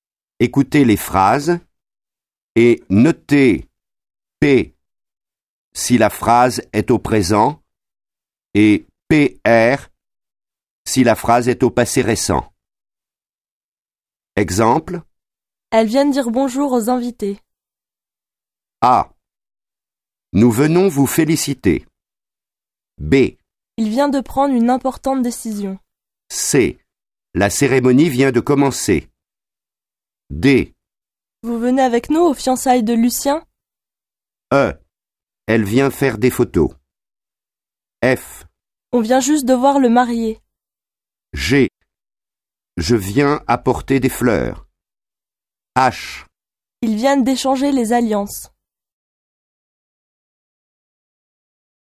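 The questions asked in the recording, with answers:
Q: Il vient de prendre une importante décision.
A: PR

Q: La cérémonie vient de commencer.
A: PR

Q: On vient juste de voir le marié.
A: PR

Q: Ils viennent d'échanger les alliances.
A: PR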